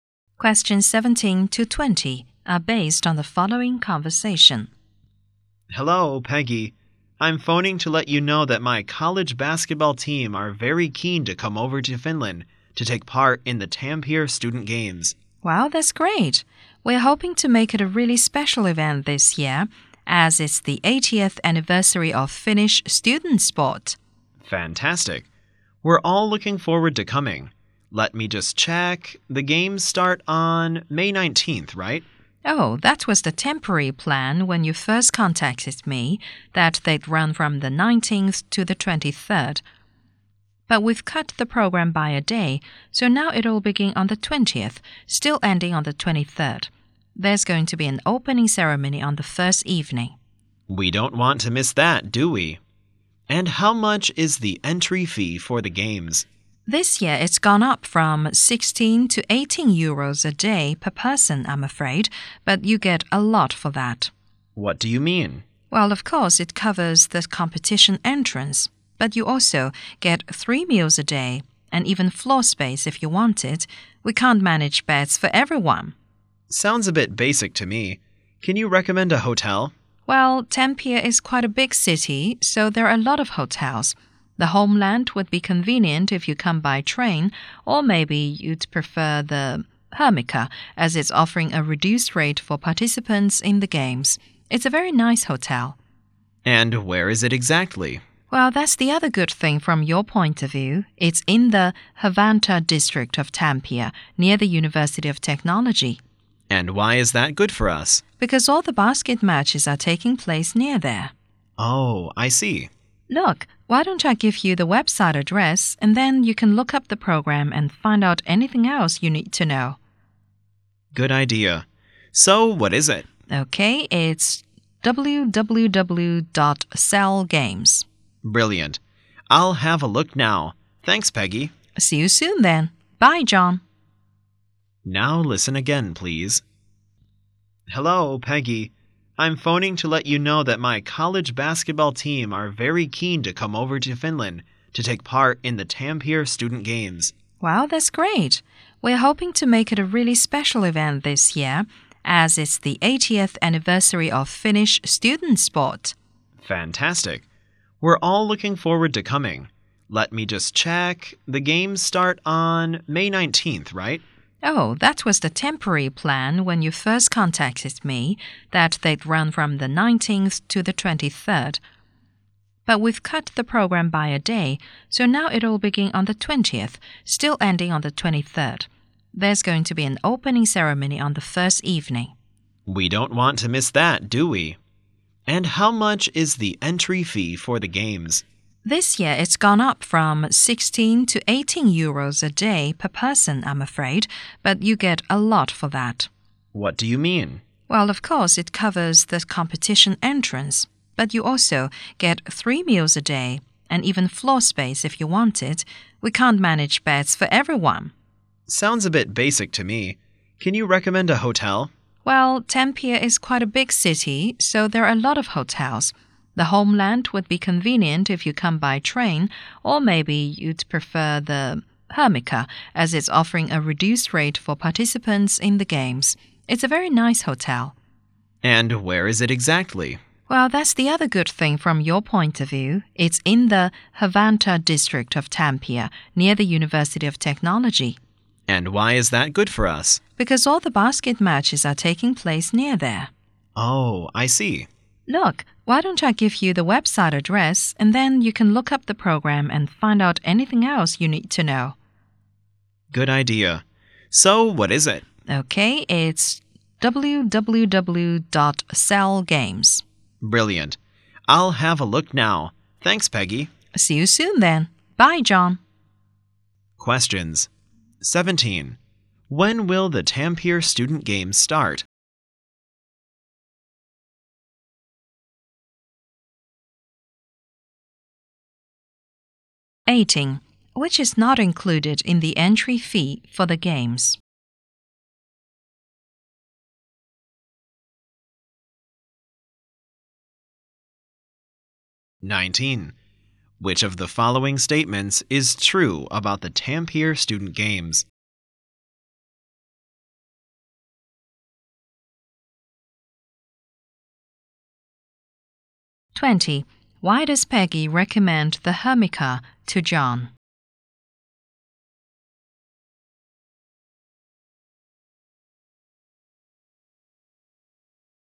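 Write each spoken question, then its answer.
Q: When will the Tampere Student Games start?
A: May 20th

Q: Why does Peggy recommend the Hermica to John?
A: It offers a reduced rate for participants and is near the basketball matches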